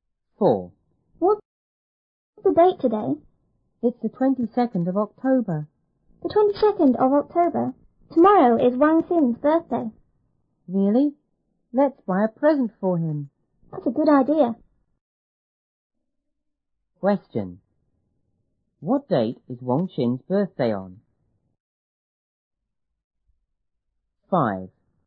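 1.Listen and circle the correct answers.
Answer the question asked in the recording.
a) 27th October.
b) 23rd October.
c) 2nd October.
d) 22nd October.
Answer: b) 23rd October.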